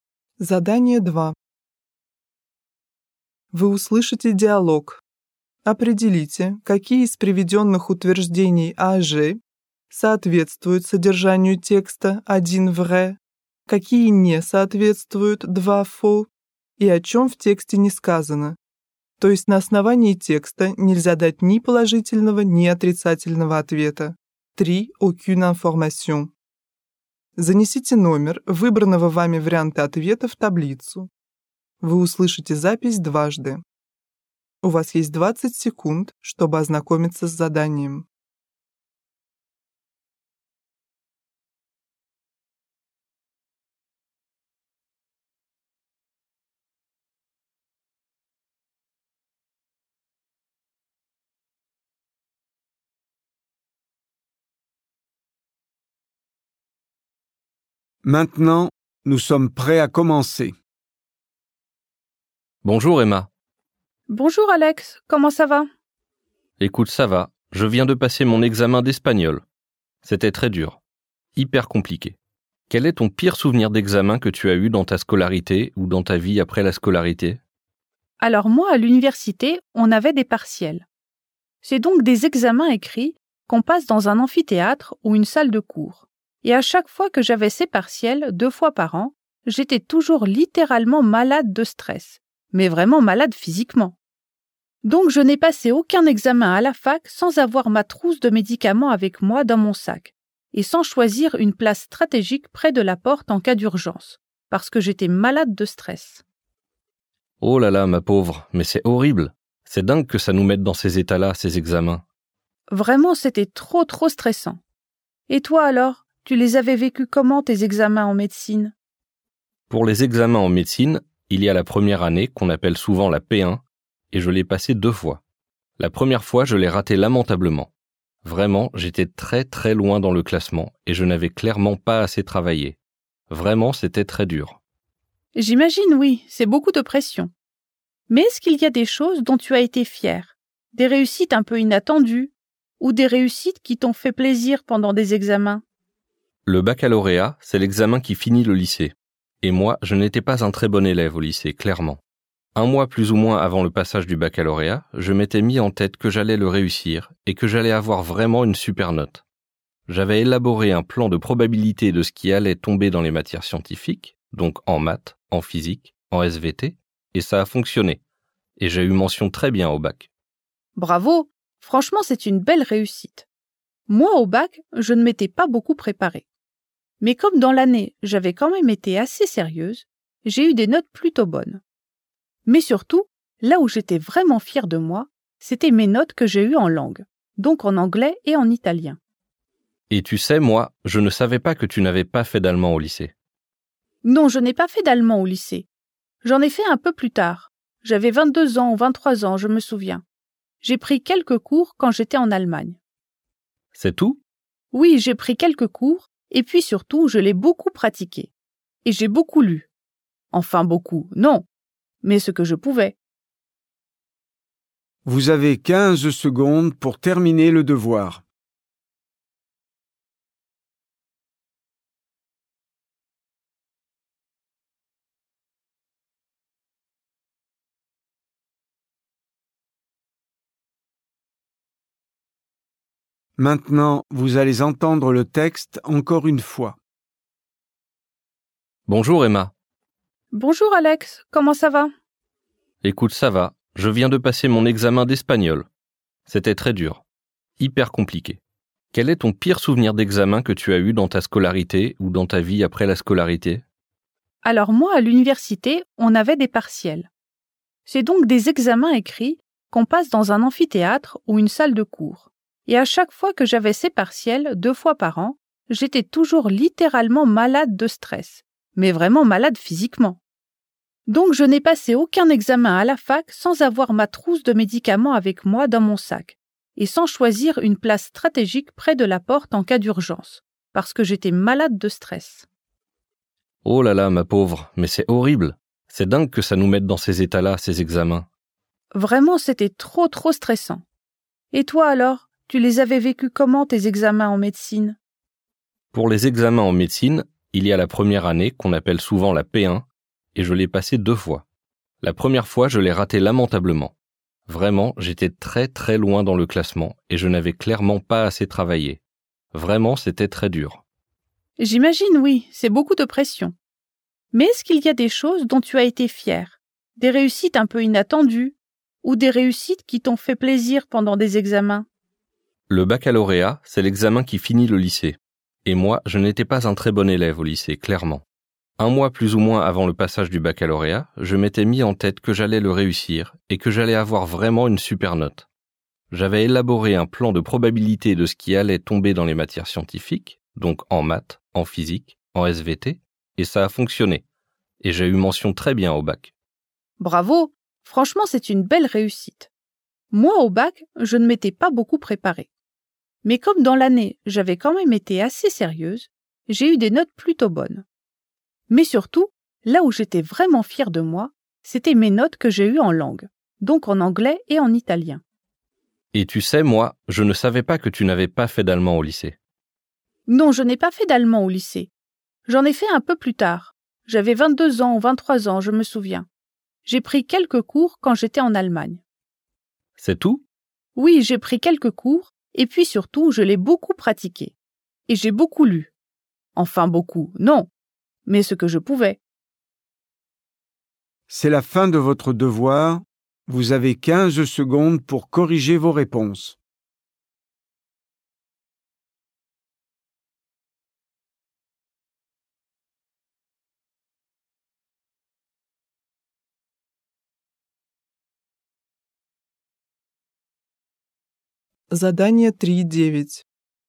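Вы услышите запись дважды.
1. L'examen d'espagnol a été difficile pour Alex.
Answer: vrai

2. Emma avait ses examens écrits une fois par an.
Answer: faux

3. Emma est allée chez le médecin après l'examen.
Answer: aucune information

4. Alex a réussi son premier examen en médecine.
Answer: faux

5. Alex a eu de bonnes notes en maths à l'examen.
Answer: vrai

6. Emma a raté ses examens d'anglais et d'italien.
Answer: faux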